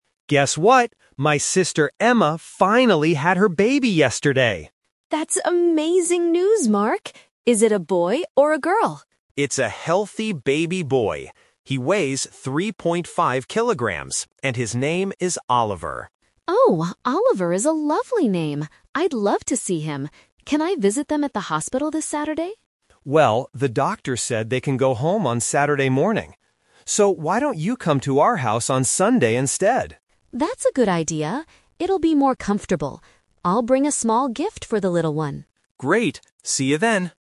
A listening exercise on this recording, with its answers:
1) What information is true about the baby?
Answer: It is a boy weighing 3.5 kilograms.

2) When is Sarah going to see the baby?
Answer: On Sunday.

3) Where will Sarah meet the baby and the mother?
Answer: At Mark's sister's house.

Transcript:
Mark: Guess what! My sister Emma finally had her baby yesterday!
Sarah: That's amazing news, Mark! Is it a boy or a girl?
Mark: It's a healthy baby boy. He weighs 3.5 kilograms and his name is Oliver.
Sarah: Oh, Oliver is a lovely name. I'd love to see him. Can I visit them at the hospital this Saturday?
Mark: Well, the doctor said they can go home on Saturday morning. So, why don't you come to our house on Sunday instead?
Sarah: That's a good idea. It'll be more comfortable. I'll bring a small gift for the little one.